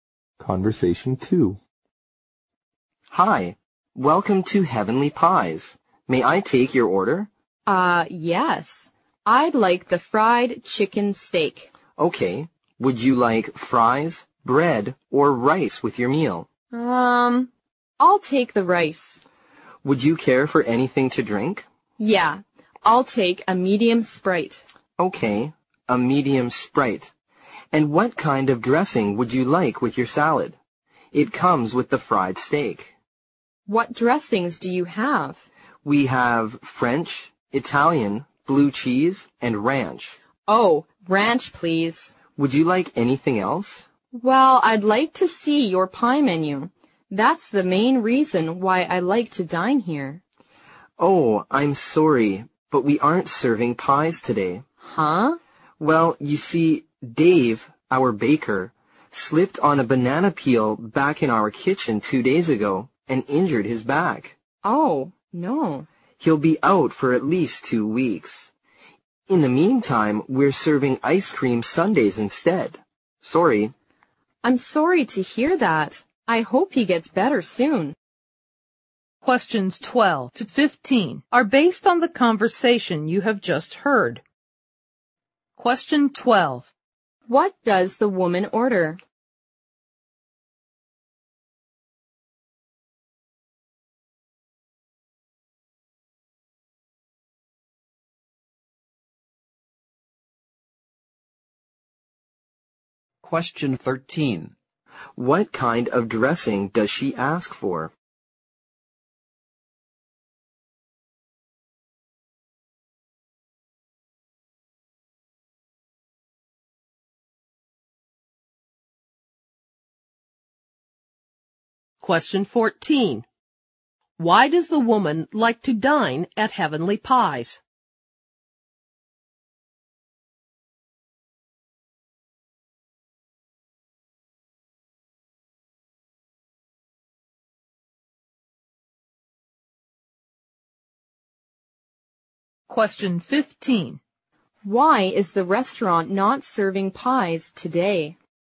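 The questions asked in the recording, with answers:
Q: What does the woman order?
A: Fried chicken steak with rice and a medium Sprite

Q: What kind of dressing does she ask for?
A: Ranch

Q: Why does the woman like to dine at Heavenly Pies?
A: For its pies

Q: Why is the restaurant not serving pies today?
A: The baker injured his back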